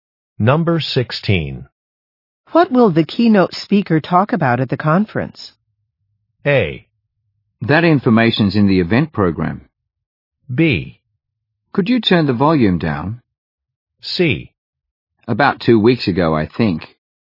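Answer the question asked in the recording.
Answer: A: That information's in the event program.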